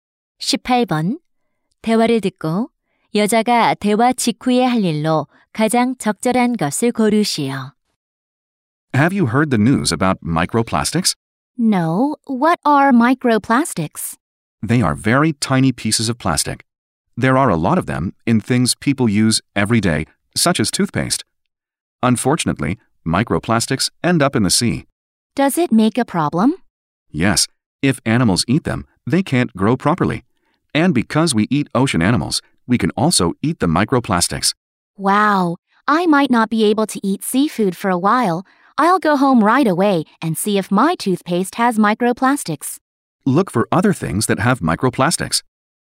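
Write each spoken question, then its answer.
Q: 대화를 듣고 여자가 대화 직후에 할 일로 가장 적절한 것을 고르시오.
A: 집에 가서 치약에 미세플라스틱이 있는지 확인하기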